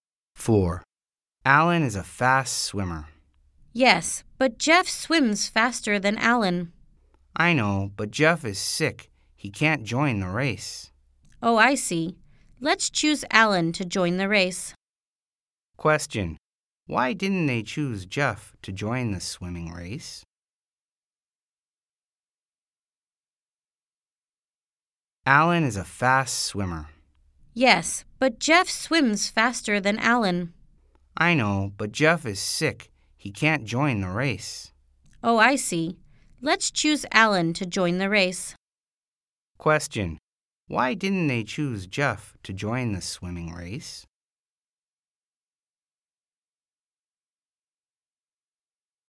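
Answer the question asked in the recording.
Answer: Because Jeff is sick.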